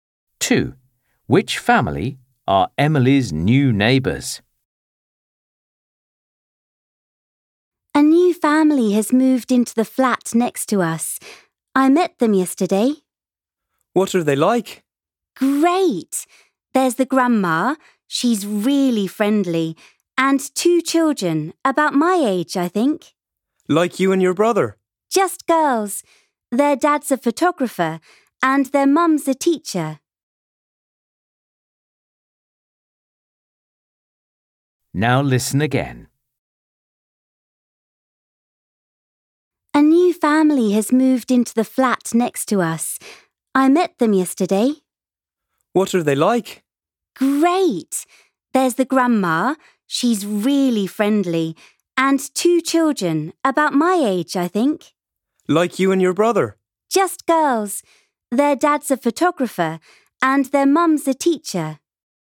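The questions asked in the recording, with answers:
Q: Which family are Emily's new neighbours?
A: a grandma, two girls, a photographer dad and a teacher mum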